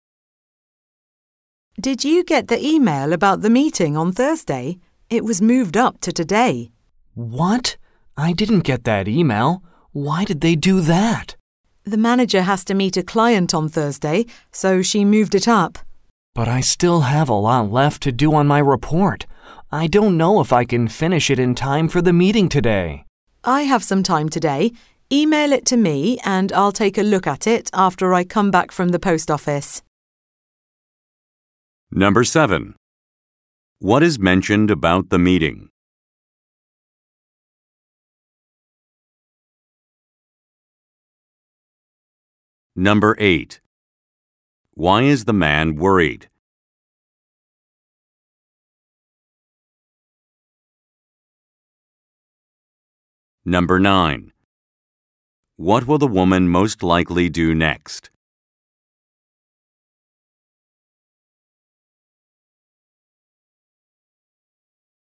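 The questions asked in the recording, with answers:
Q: What is mentioned about the meeting?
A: It was moved up from Thursday to today.

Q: Why is the man worried?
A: He may not finish his report in time for the meeting.

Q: What will the woman most likely do next?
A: Go to the post office.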